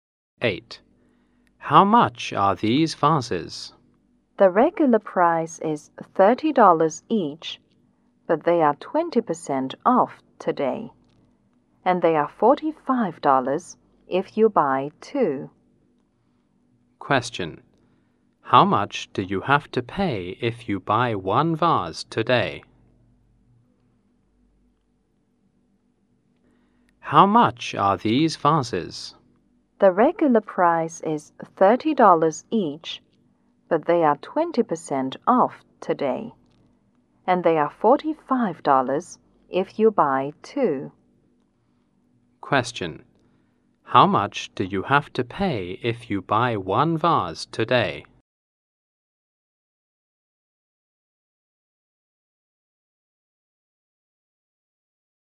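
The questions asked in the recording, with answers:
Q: How much do you have to pay if you buy one vase today?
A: $24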